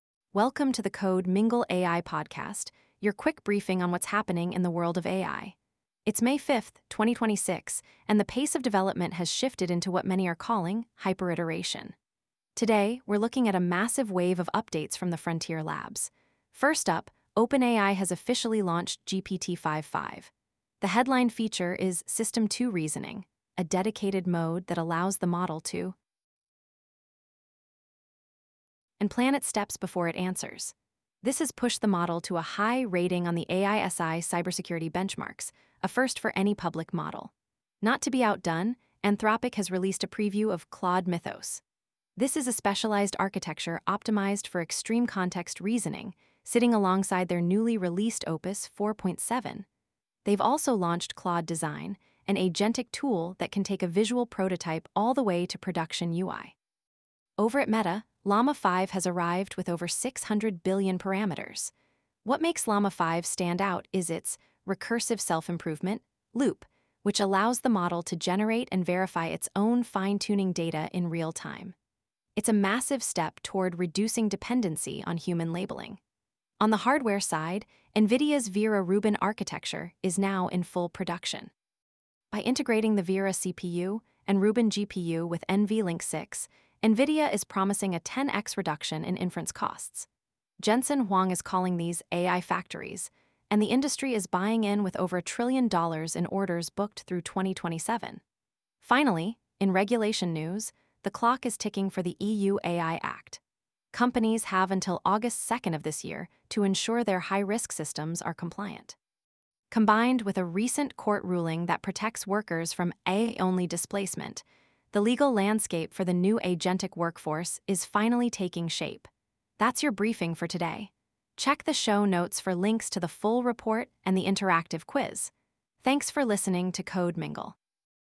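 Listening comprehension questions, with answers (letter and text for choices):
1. Which new feature in OpenAI's GPT-5.5 allows for deliberate, multi-step planning?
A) Recursive Loop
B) System 2 Reasoning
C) Antigravity Mode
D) NVLink 6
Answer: B) System 2 Reasoning

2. What is the name of NVIDIA's latest architecture that entered full production in May 2026?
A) Blackwell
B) Hopper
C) Vera Rubin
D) Grace-Hopper 2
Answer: C) Vera Rubin

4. What is 'Recursive Self-Improvement' (RSI) as seen in Llama 5?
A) Models training on human-only data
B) Models generating and learning from their own high-quality synthetic data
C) A method to reduce GPU power consumption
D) A way to encrypt AI model weights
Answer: B) Models generating and learning from their own high-quality synthetic data

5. When is the compliance deadline for the EU AI Act for high-risk systems?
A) May 5, 2026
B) August 2, 2026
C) January 1, 2027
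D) December 25, 2025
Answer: B) August 2, 2026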